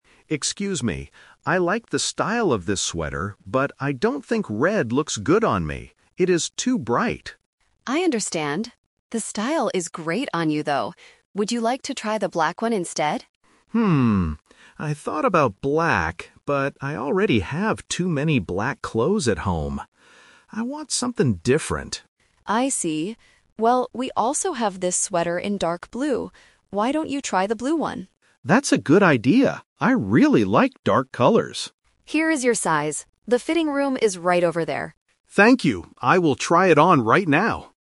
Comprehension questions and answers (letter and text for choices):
Listen to the conversation and choose the correct answer (A, B, or C).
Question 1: Why doesn't the man want to buy the black sweater?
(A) Because the shop does not have his size.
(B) Because he already has a lot of black clothes.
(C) Because it is too bright for him.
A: (B) Because he already has a lot of black clothes.

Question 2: What color sweater does the assistant suggest finally?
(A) Red.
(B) Green.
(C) Blue.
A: (C) Blue.

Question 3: Where is the man going at the end of the conversation?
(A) To the fitting room.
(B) To the cashier to pay.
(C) To another clothing store.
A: (A) To the fitting room.

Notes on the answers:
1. The customer says, "I already have too many black clothes at home." Option C is a Trap (being "too bright" is the reason he rejected the red sweater). Option A is a plausible reason in a clothing store but is not mentioned.
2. This is the Final Result (The Twist). The assistant says, "Why don't you try the blue one?" Option A is the Trap (the red sweater is the one he is currently holding/wearing but doesn't like). Option B is not mentioned.
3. The assistant tells him "The fitting room is right over there," and he says "I will try it on right now." Option B is a Trap because he needs to try it on before paying. Option C is not mentioned.

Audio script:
Customer: Excuse me, I like the style of this sweater, but I don't think red looks good on me. It is too bright.
Assistant: I understand. The style is great on you, though. Would you like to try the black one instead?
I thought about black, but I already have too many black clothes at home. I want something different.
Assistant: I see. Well, we also have this sweater in dark blue. Why don't you try the blue one?
Customer: That's a good idea. I really like dark colors.
Assistant: Here is your size. The fitting room is right over there.